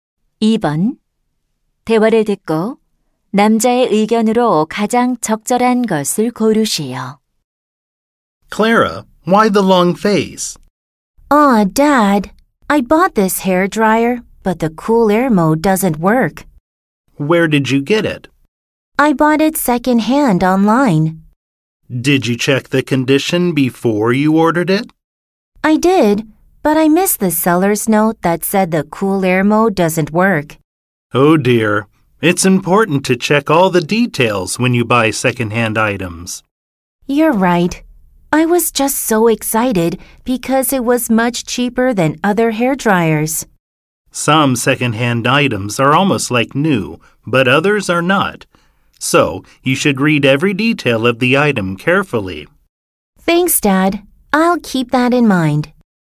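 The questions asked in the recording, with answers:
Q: 대화를 듣고 남자의 의견으로 가장 적절한 것을 고르시오.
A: 중고 물품을 살 때는 세부 사항을 꼼꼼히 확인해야 한다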